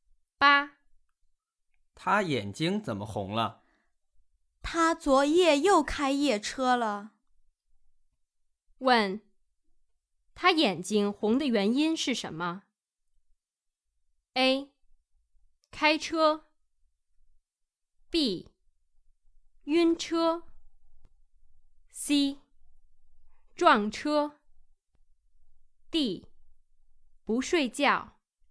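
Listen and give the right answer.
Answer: D: 不睡觉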